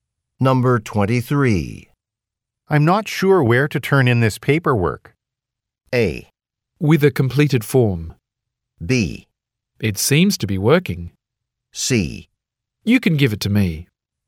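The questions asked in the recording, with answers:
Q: I'm not sure where to turn in this paperwork.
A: C: You can give it to me.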